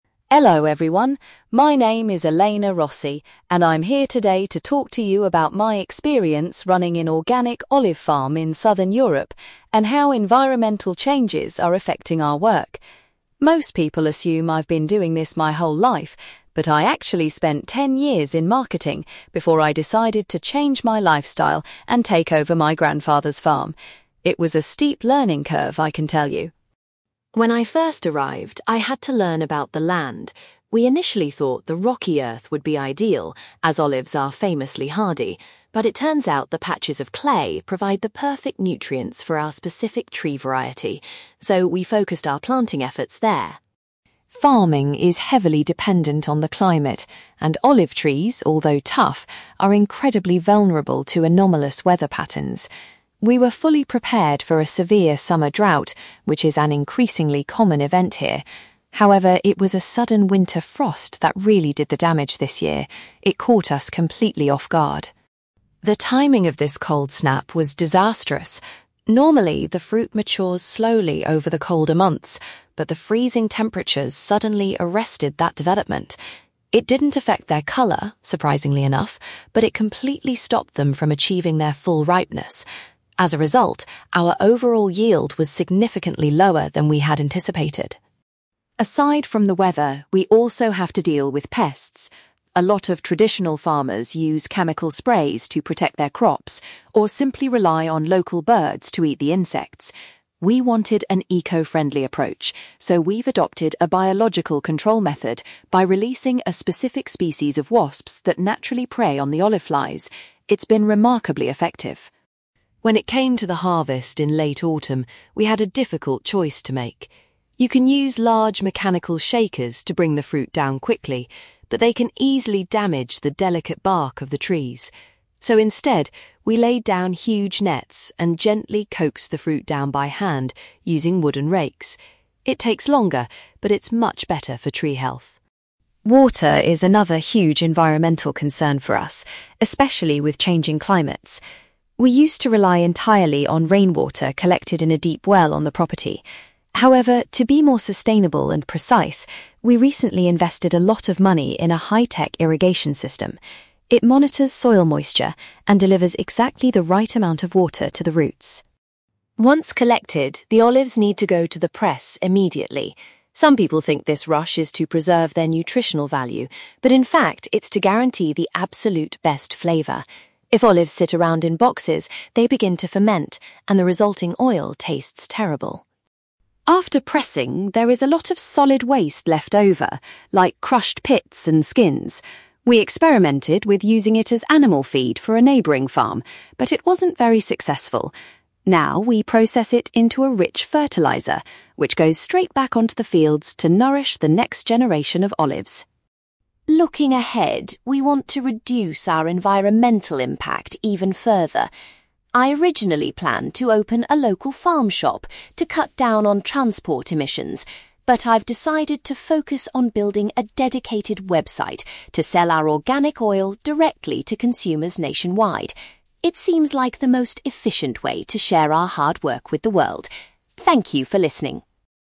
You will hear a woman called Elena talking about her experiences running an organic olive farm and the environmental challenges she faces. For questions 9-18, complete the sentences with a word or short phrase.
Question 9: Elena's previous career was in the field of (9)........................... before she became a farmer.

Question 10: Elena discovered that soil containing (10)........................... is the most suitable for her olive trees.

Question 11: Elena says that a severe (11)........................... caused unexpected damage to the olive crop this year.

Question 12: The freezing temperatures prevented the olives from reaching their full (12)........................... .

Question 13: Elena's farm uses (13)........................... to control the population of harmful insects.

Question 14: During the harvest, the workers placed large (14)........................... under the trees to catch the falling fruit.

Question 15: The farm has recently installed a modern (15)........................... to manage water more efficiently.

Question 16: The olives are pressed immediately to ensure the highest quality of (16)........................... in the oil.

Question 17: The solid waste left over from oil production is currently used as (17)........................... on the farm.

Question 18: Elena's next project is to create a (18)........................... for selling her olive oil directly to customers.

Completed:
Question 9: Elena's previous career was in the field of marketing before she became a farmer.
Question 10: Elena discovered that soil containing clay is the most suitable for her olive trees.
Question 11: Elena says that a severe winter frost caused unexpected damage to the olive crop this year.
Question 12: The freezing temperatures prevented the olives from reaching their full ripeness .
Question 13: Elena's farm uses wasps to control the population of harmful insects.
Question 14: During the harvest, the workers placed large nets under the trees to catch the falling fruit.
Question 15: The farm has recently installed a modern irrigation system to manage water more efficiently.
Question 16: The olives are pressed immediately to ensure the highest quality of flavour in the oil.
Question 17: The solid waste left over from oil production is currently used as fertiliser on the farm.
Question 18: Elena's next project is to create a website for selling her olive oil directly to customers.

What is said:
Elena: Hello, everyone. My name is Elena Rossi, and I'm here today to talk to you about my experience running an organic olive farm in southern Europe, and how environmental changes are affecting our work. Most people assume I've been doing this my whole life, but I actually spent ten years in marketing before I decided to change my lifestyle and take over my grandfather's farm. It was a steep learning curve, I can tell you!
When I first arrived, I had to learn about the land. We initially thought the rocky earth would be ideal, as olives are famously hardy, but it turns out the patches of clay provide the perfect nutrients for our specific tree variety. So, we focused our planting efforts there.
Farming is heavily dependent on the climate, and olive trees, although tough, are incredibly vulnerable to anomalous weather patterns. We were fully prepared for a severe summer drought, which is an increasingly common event here. However, it was a sudden winter frost that really did the damage this year. It caught us completely off guard.
The timing of this cold snap was disastrous. Normally, the fruit matures slowly over the colder months, but the freezing temperatures suddenly arrested that development. It didn't affect their colour, surprisingly enough, but it completely stopped them from achieving their full ripeness. As a result, our overall yield was significantly lower than we had anticipated.
Aside from the weather, we also have to deal with pests. A lot of traditional farmers use chemical sprays to protect their crops, or simply rely on local birds to eat the insects. We wanted an eco-friendly approach, so we've adopted a biological control method by releasing a specific species of wasps that naturally prey on the olive flies. It's been remarkably effective.
When it came to the harvest in late autumn, we had a difficult choice to make. You can use large mechanical shakers to bring the fruit down quickly, but they can easily damage the delicate bark of the trees. So instead, we laid down huge nets and gently coaxed the fruit down by hand using wooden rakes. It takes longer, but it's much better for tree health.
Water is another huge environmental concern for us, especially with changing climates. We used to rely entirely on rainwater collected in a deep well on the property. However, to be more sustainable and precise, we recently invested a lot of money in a high-tech irrigation system. It monitors soil moisture and delivers exactly the right amount of water to the roots.
Once collected, the olives need to go to the press immediately. Some people think this rush is to preserve their nutritional value, but in fact, it's to guarantee the absolute best flavour. If olives sit around in boxes, they begin to ferment, and the resulting oil tastes terrible.
After pressing, there is a lot of solid waste left over, like crushed pits and skins. We experimented with using it as animal feed for a neighbouring farm, but it wasn't very successful. Now, we process it into a rich fertiliser, which goes straight back onto the fields to nourish the next generation of olives.
Looking ahead, we want to reduce our environmental impact even further. I originally planned to open a local farm shop to cut down on transport emissions, but I've decided to focus on building a dedicated website to sell our organic oil directly to consumers nationwide. It seems like the most efficient way to share our hard work with the world. Thank you for listening.

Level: B2